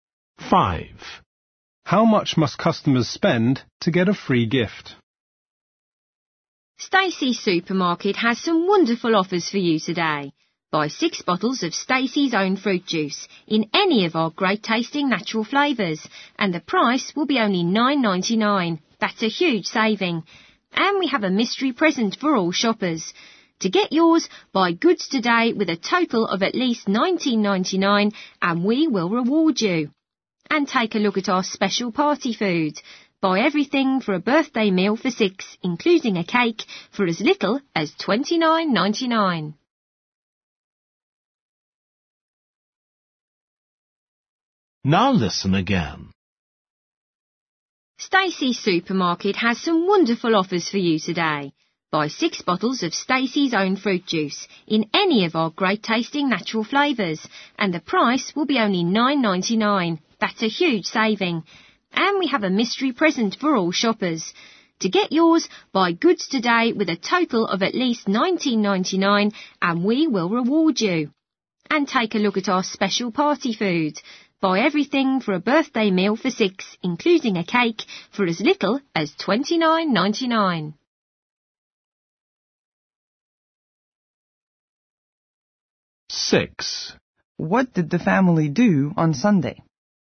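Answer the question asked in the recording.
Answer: at least $19.99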